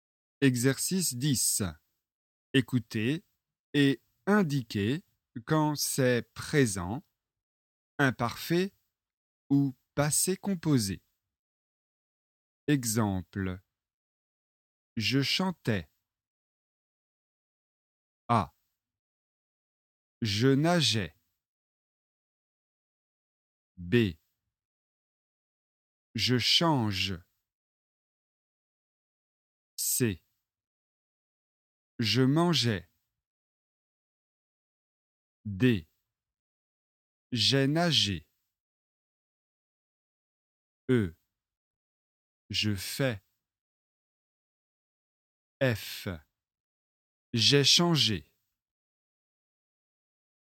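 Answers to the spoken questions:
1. imparfait
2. présent
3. imparfait
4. passé composé
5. présent
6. passé composé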